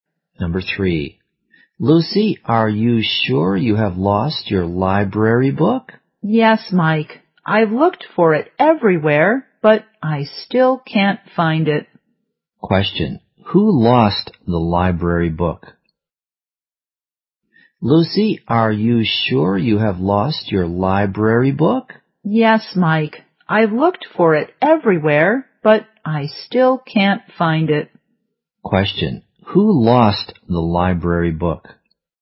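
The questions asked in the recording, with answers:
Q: Question, who lost the library book?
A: Lucy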